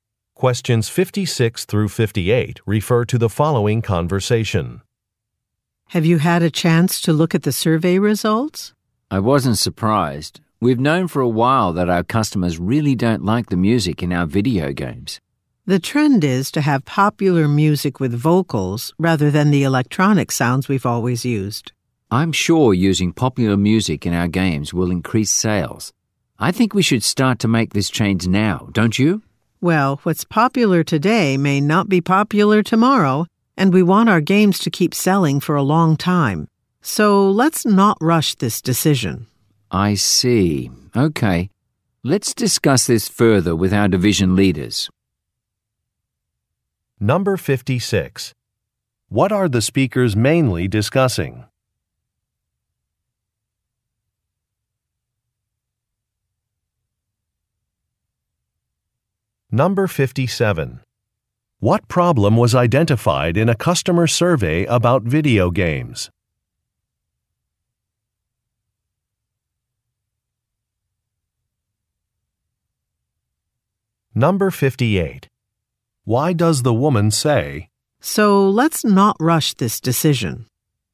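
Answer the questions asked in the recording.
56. Music in their video games
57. Customers don't like the music
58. She disagrees with changing now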